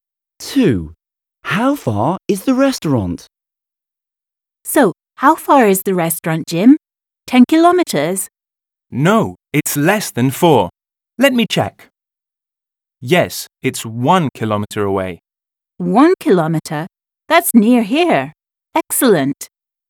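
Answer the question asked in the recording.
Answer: 1 kilometre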